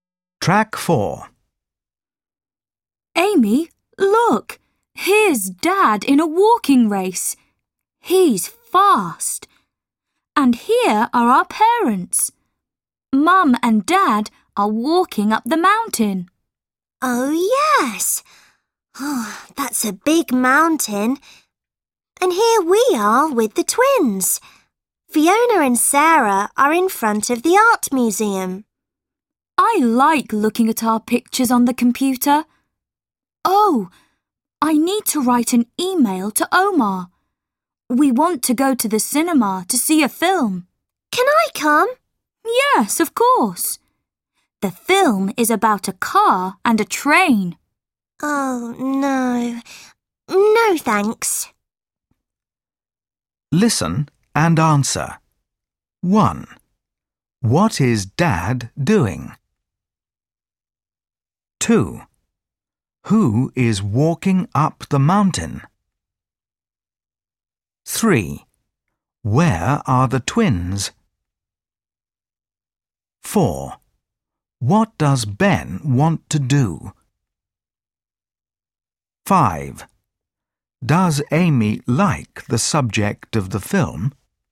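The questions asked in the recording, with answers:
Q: What is Dad doing?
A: He's in a walking race.

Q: Who is walking up the mountain?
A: Mum and Dad (their parents)

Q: Where are the twins?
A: In front of the art museum

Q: What does Ben want to do?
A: Go to the cinema to see a film

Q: Does Amy like the subject of the film?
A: No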